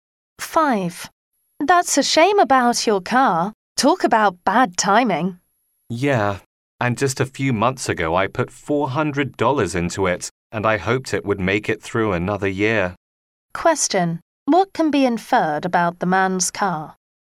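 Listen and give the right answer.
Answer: It broke down soon after he spent $400 repairing it.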